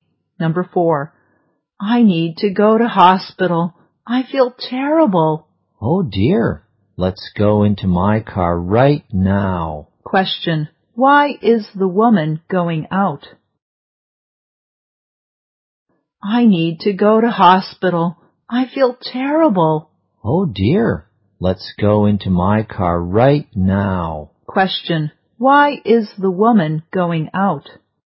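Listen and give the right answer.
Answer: She feels terrible and needs to go to hospital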